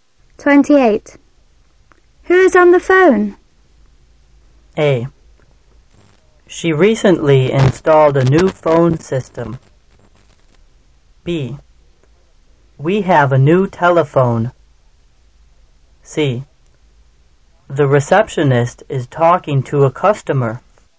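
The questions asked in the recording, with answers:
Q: Who is on the phone?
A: C: The receptionist is talking to a customer.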